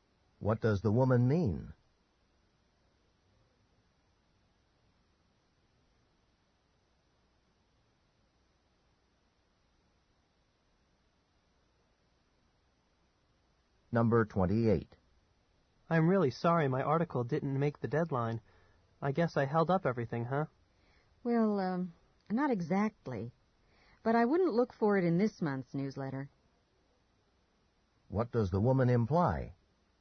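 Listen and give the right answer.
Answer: The article won't be in this month's newsletter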